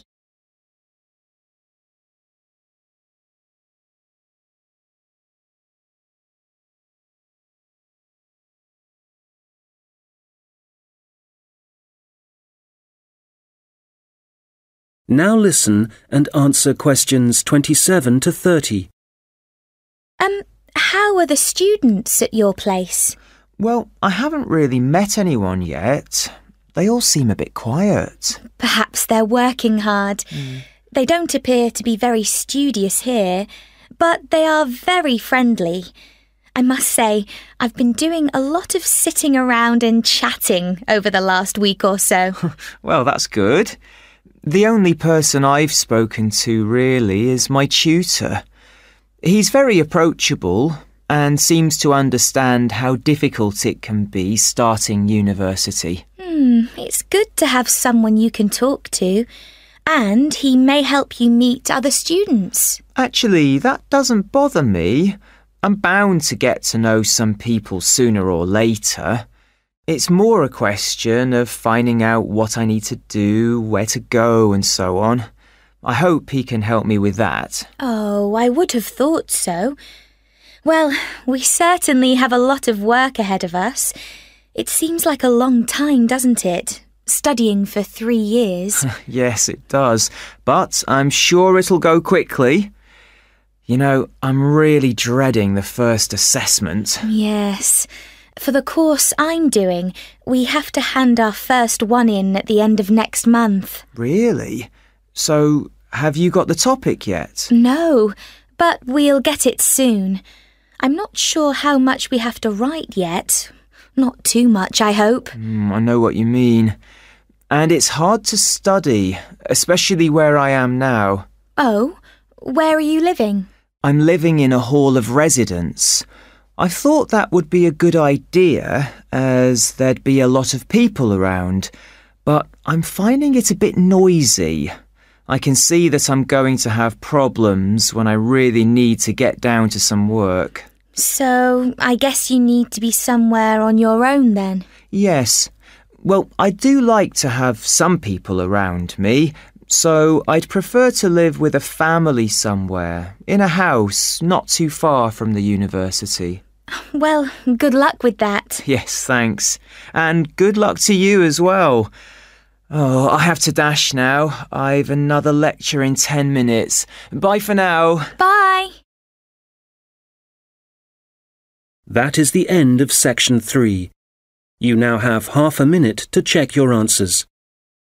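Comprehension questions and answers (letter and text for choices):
Questions 27-30 Choose the correct letter, A, B or C.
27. Martina thinks the students at her university are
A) sociable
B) intelligent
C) energetic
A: A) sociable

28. George hopes that his tutor will help him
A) lose his shyness.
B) settle into university.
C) getto know his subject better.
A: B) settle into university.

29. What does Martina know about her first assignment?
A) the topic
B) the length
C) the deadline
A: C) the deadline

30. George would like to live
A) in a hall of residence.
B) in a flat on his own.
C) with a host family.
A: C) with a host family.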